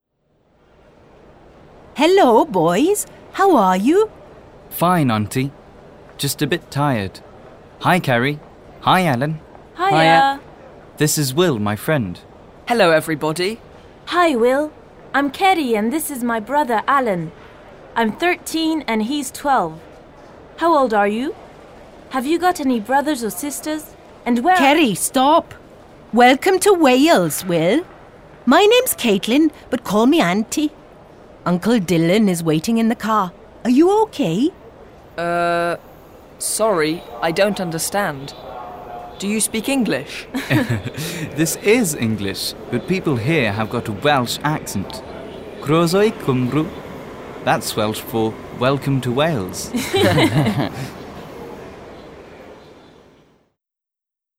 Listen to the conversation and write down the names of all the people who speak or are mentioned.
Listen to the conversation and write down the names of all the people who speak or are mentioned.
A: Auntie Caitlin, Steve, Will, Ceri, Alan, Uncle Dylan

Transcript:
Ceri (very excited): Hi, Will. I'm Ceri and this is my brother Alan. I'm 13 and he's 12. How old are you? Have you got any brothers or sisters? And...
Auntie Caitlin (interrupting): Ceri, stop. (to Will) Welcome to Wales, Will. My name's Caitlin, but call me Auntie. Uncle Dylan is waiting in the car. Are you OK?
Will: Er.... Sorry, I don't understand. Do you speak English?
Steve (laughing): This is English but people here have got a Welsh accent. Croeso i Cymru! That's Welsh for "Welcome to Wales"!